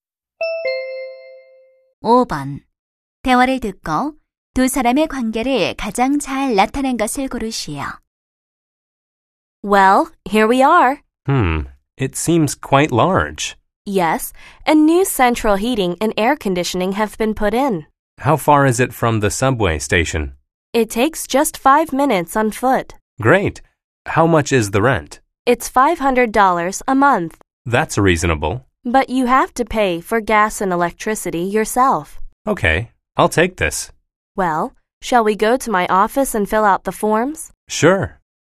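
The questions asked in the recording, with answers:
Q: 대화를 듣고 두 사람의 관계를 가장 잘 나타낸 것을 고르시오.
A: 부동산 중개인 - 세입자(고객)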